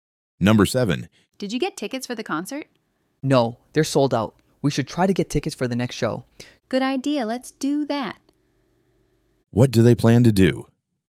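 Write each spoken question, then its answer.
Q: What do they plan to do?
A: Try to get tickets for the next show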